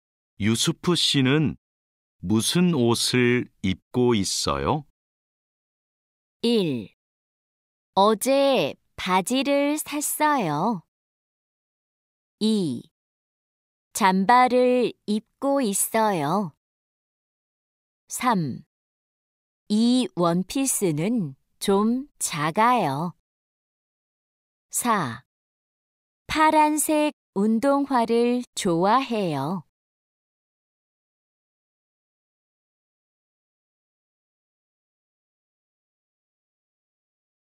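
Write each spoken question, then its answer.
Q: 유수프 씨는 무슨 옷을 입고 있어요?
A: 2: 잠바를 입고 있어요.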